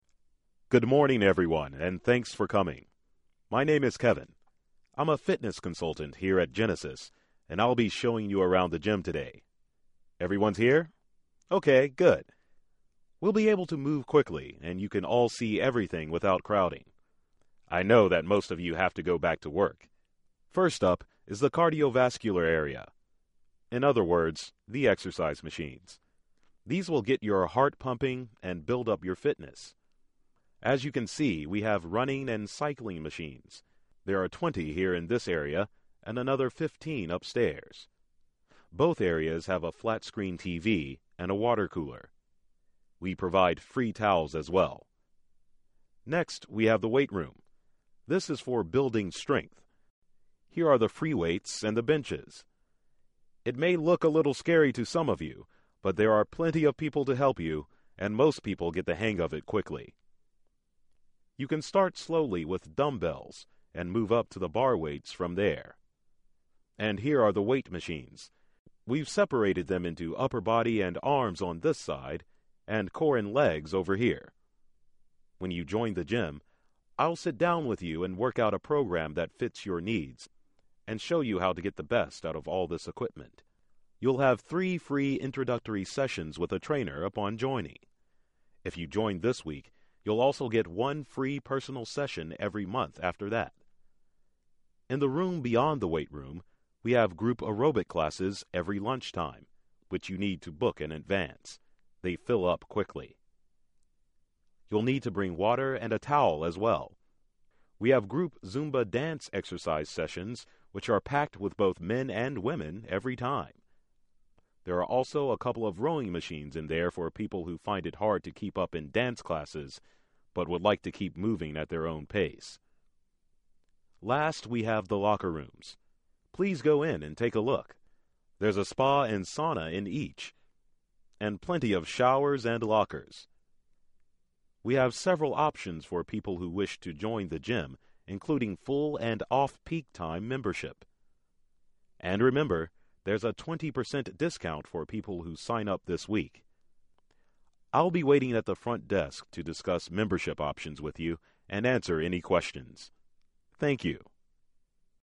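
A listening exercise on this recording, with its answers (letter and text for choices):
You will hear a fitness consultant give a tour of a gym. You can play the recording TWO times. Answer the questions based on what you hear.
Which ONE of the following best states the central focus of the speaker's talk?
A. The parts of a personal training program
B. Various options for gym membership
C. Location of gym equipment and activities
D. Explanations of how dance classes work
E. Weight training to build strength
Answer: C. Location of gym equipment and activities

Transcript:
MAN: Good morning everyone and thanks for coming. My name is Kevin. I'm a fitness consultant here at Genesis and I'll be showing you around the gym today. Everyone's here? Okay, good. We'll be able to move quickly and you can all see everything without crowding. I know that most of you have to go back to work. First up is the cardiovascular area — in other words, the exercise machines. 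These will get your heart pumping and build up your fitness. As you can see we have running and cycling machines. There are twenty here in this area and another fifteen upstairs. Both areas have a flat screen TV and a water cooler. We provide free towels as well. Next, we have the weight room. This is for building strength. Here are the free weights and the benches. It may look a little scary to some of you, but there are plenty of people to help you, and most people get the hang of it quickly. You can start slowly with dumb bells and move up to the bar weights from there. And here are the weight machines. We've separated them into upper body and arms on this side, and core and legs over here. When you join the gym, I'll sit down with you and work out a program that fits your needs, and show you how to get the best out of all of this equipment. You'll have three free introductory sessions with a trainer upon joining. 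If you join this week you'll also get one free personal session every month after that. In the room beyond the weight room, we have group aerobic classes every lunch time, which you need to book in advance — they fill up quickly. You'll need to bring water and a towel as well! We have group Zumba dance exercise sessions, which are packed with both men and women every time. There are also a couple of rowing machines in there for people who find it hard to keep up in dance classes but would like to keep moving at their own pace. Last we have the locker rooms. Please go in and take a look. There's a spa and sauna in each, and plenty of showers and lockers. We have several options for people who wish to join the gym, including full and off-peak time membership. And remember, there's a 20% discount for people who sign up this week. I'll be waiting at the front desk to discuss membership options with you and answer any questions. 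Thank you.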